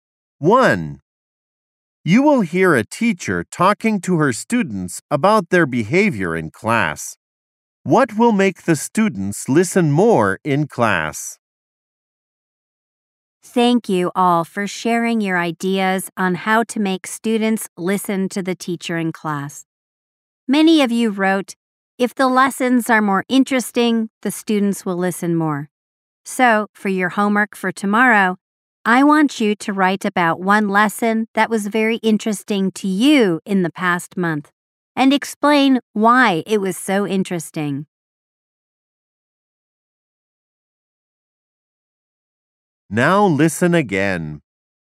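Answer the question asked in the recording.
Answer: More interesting lessons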